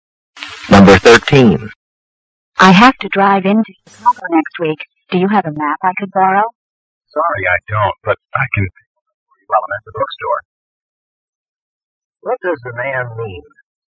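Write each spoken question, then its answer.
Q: What does the man mean?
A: He doesn't have a map but will buy one for her at the bookstore.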